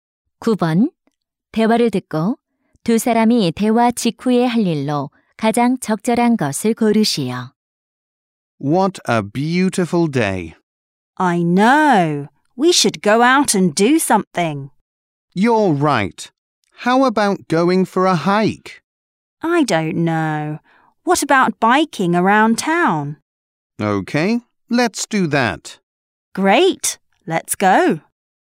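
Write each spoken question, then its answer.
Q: 대화를 듣고 두 사람이 대화 직후에 할 일로 가장 적절한 것을 고르시오.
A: 자전거 타고 시내 돌기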